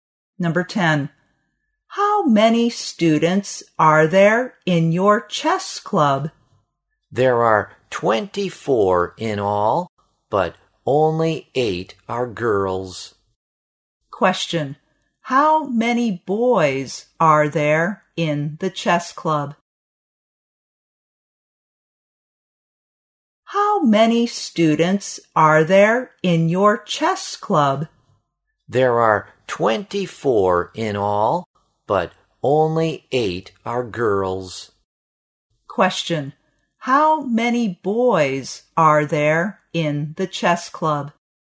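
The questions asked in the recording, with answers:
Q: How many boys are there in the chess club?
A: 16.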